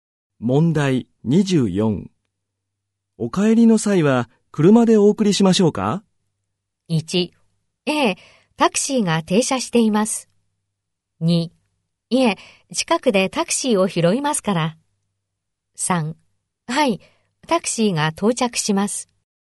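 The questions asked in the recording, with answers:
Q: お帰りの際は車でお送りしましょうか?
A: 2: いえ、近くでタクシーを拾いますから。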